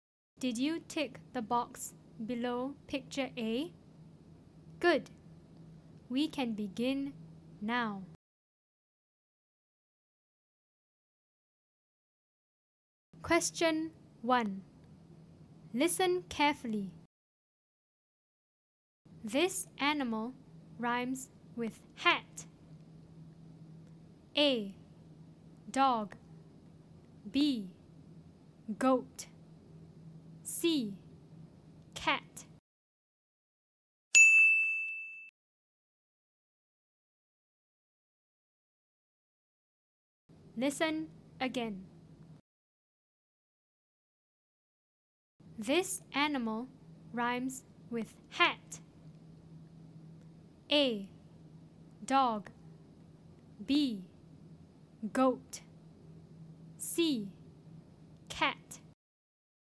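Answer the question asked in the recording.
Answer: C: Cat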